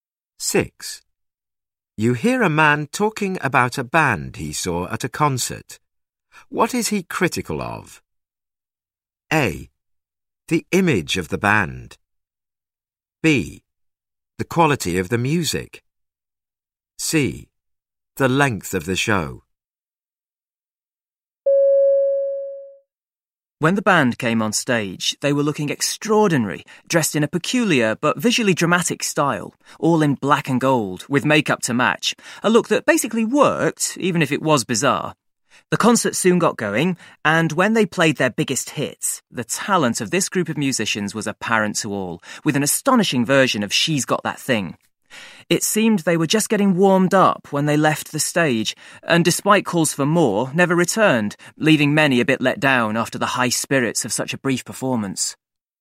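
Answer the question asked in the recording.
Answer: C: The length of the show.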